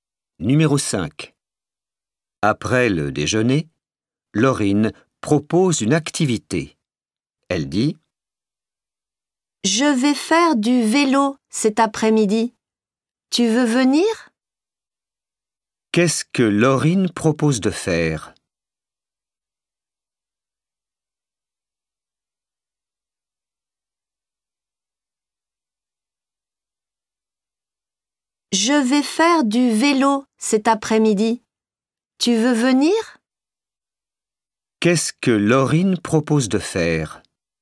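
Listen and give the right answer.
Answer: du vélo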